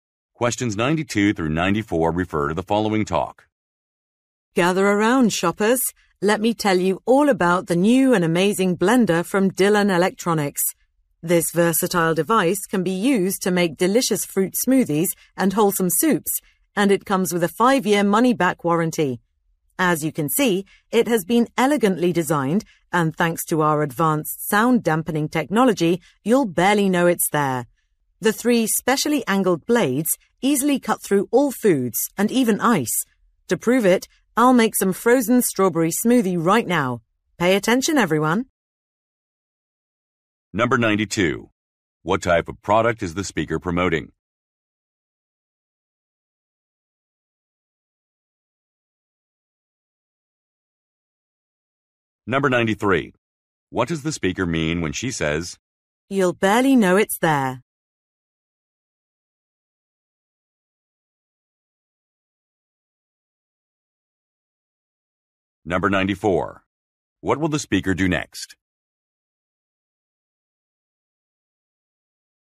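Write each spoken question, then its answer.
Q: What type of product is the speaker promoting?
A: A blender

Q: "You'll barely know it's there"?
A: The blender is very quiet

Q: What will the speaker do next?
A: Make a frozen strawberry smoothie (a demonstration)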